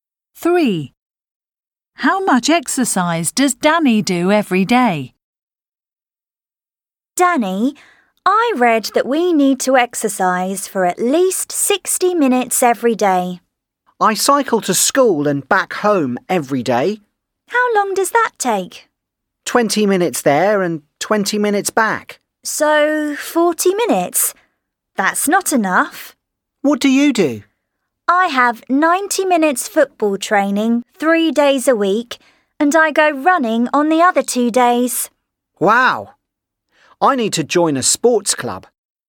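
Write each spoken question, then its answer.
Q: How much exercise does Danny do every day?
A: 40 minutes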